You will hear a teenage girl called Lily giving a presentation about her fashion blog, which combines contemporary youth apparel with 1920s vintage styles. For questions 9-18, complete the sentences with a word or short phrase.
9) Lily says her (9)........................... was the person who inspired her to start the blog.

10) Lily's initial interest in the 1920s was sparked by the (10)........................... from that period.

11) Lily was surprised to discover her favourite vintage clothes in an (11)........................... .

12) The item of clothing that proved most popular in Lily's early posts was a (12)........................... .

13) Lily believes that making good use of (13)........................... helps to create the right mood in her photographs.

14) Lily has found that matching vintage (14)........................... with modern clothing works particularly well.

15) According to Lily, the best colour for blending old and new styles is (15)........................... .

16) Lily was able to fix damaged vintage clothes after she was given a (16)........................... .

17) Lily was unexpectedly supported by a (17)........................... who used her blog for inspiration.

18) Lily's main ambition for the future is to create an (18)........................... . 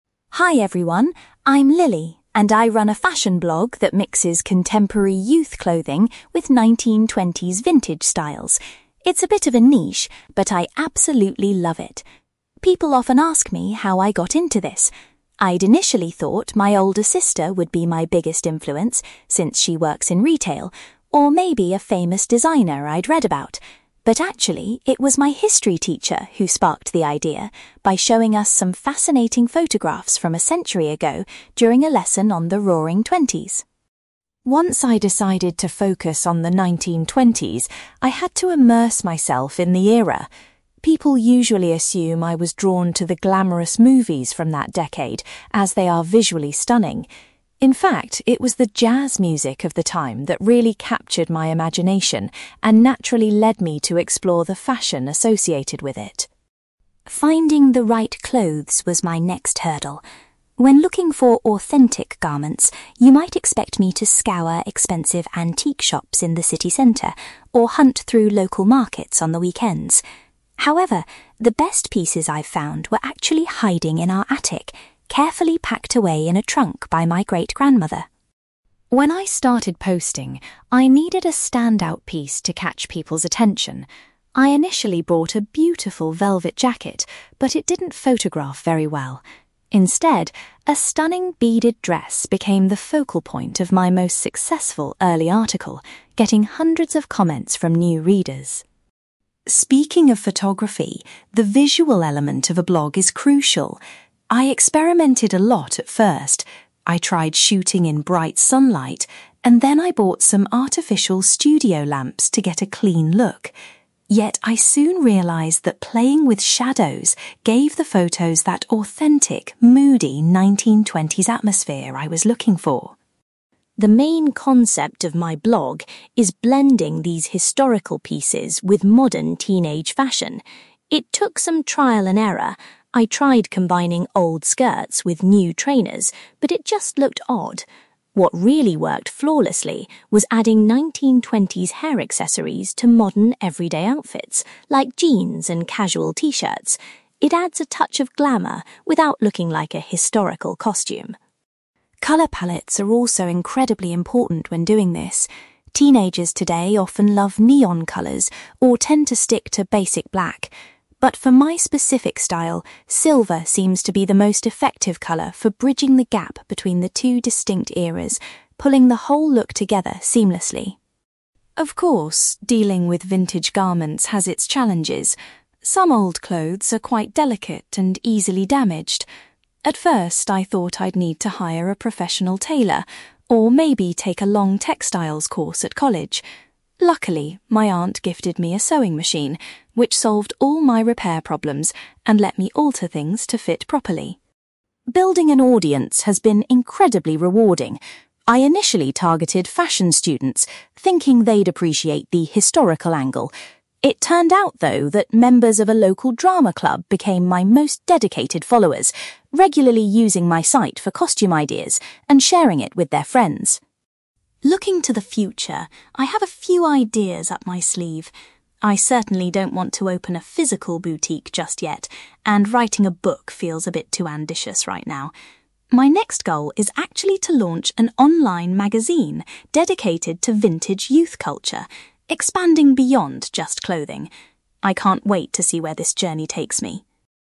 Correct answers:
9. history teacher
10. jazz music
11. attic
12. beaded dress
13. shadows
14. hair accessories
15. silver
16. sewing machine
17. drama club
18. online magazine

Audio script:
Lily: Hi everyone! I'm Lily, and I run a fashion blog that mixes contemporary youth clothing with 1920s vintage styles. It's a bit of a niche, but I absolutely love it. People often ask me how I got into this. I'd initially thought my older sister would be my biggest influence, since she works in retail, or maybe a famous designer I'd read about. But actually, it was my history teacher who sparked the idea by showing us some fascinating photographs from a century ago during a lesson on the Roaring Twenties.
Once I decided to focus on the 1920s, I had to immerse myself in the era. People usually assume I was drawn to the glamorous movies from that decade, as they are visually stunning. In fact, it was the jazz music of the time that really captured my imagination and naturally led me to explore the fashion associated with it.
Finding the right clothes was my next hurdle. When looking for authentic garments, you might expect me to scour expensive antique shops in the city centre or hunt through local markets on the weekends. However, the best pieces I've found were actually hiding in our attic, carefully packed away in a trunk by my great-grandmother.
When I started posting, I needed a standout piece to catch people's attention. I initially bought a beautiful velvet jacket, but it didn't photograph very well. Instead, a stunning beaded dress became the focal point of my most successful early article, getting hundreds of comments from new readers.
Speaking of photography, the visual element of a blog is crucial. I experimented a lot at first. I tried shooting in bright sunlight, and then I bought some artificial studio lamps to get a clean look. Yet, I soon realised that playing with shadows gave the photos that authentic, moody 1920s atmosphere I was looking for.
The main concept of my blog is blending these historical pieces with modern teenage fashion. It took some trial and error. I tried combining old skirts with new trainers, but it just looked odd. What really worked flawlessly was adding 1920s hair accessories to modern everyday outfits, like jeans and casual t-shirts. It adds a touch of glamour without looking like a historical costume.
Colour palettes are also incredibly important when doing this. Teenagers today often love neon colours, or tend to stick to basic black. But for my specific style, silver seems to be the most effective colour for bridging the gap between the two distinct eras, pulling the whole look together seamlessly.
Of course, dealing with vintage garments has its challenges. Some old clothes are quite delicate and easily damaged. At first, I thought I'd need to hire a professional tailor, or maybe take a long textiles course at college. Luckily, my aunt gifted me a sewing machine, which solved all my repair problems and let me alter things to fit properly.
Building an audience has been incredibly rewarding. I initially targeted fashion students, thinking they'd appreciate the historical angle. It turned out, though, that members of a local drama club became my most dedicated followers, regularly using my site for costume ideas and sharing it with their friends.
Looking to the future, I have a few ideas up my sleeve. I certainly don't want to open a physical boutique just yet, and writing a book feels a bit too ambitious right now. My next goal is actually to launch an online magazine dedicated to vintage youth culture, expanding beyond just clothing. I can't wait to see where this journey takes me!

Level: B2